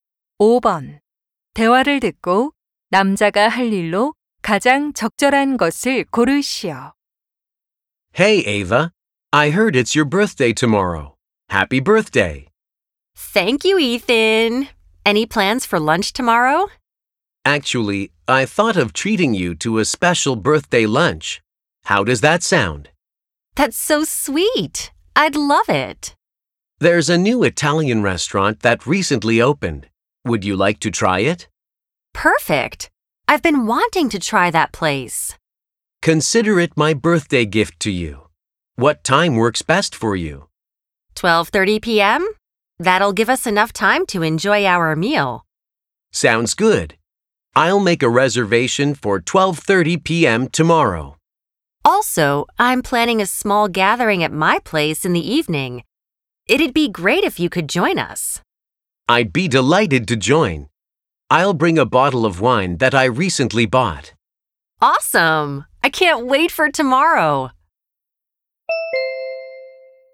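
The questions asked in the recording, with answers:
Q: 대화를 듣고 남자가 할 일로 가장 적절한 것을 고르시오.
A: 이탈리아 식당 예약하기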